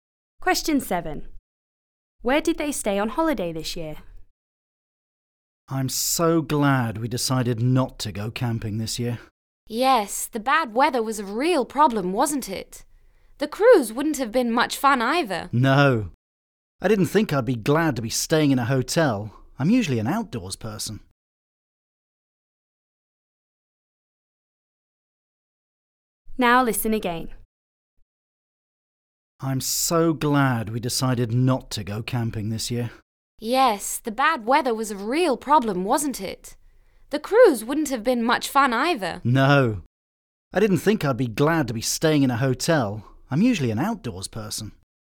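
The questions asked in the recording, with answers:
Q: Where did they stay on holiday this year?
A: In a hotel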